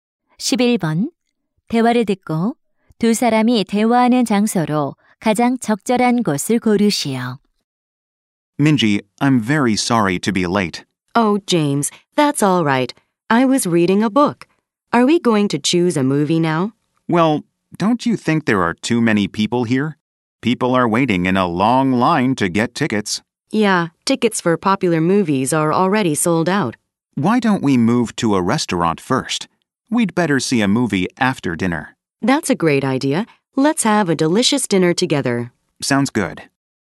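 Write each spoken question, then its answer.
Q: 대화를 듣고 두 사람이 대화하는 장소로 가장 적절한 곳을 고르시오.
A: 영화관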